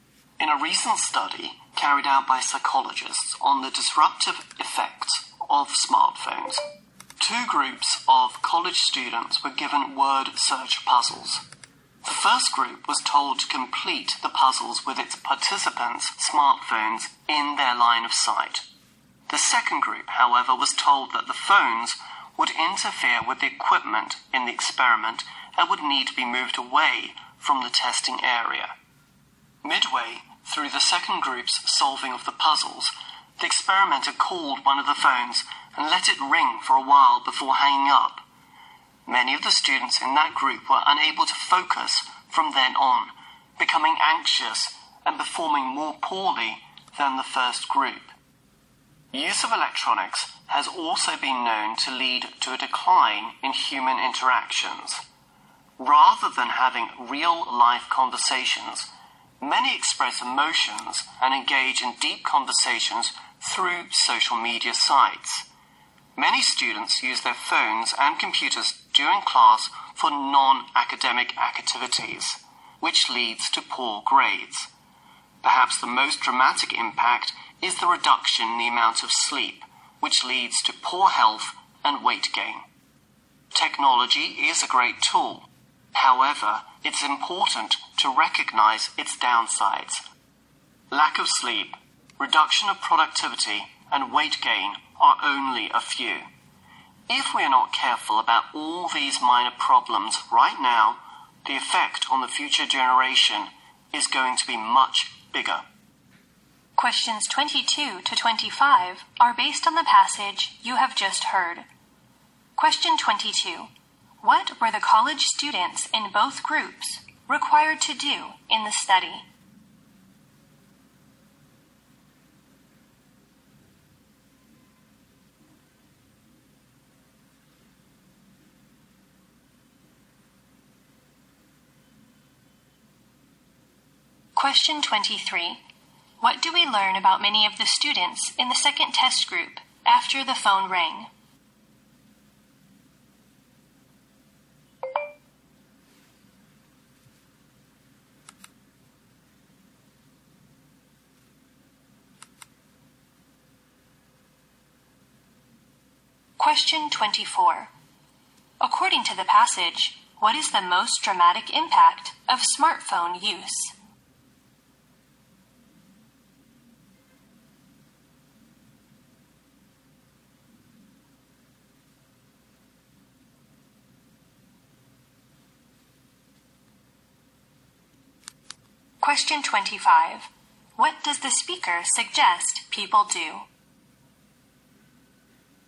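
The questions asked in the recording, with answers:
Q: What were the college students in both groups required to do in the study?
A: Complete word search puzzles

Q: What do we learn about many of the students in the second test group after the phone rang?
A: They couldn't focus, became anxious and performed more poorly than the first group

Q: According to the passage, what is the most dramatic impact of smartphone use?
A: Less sleep, which leads to poor health and weight gain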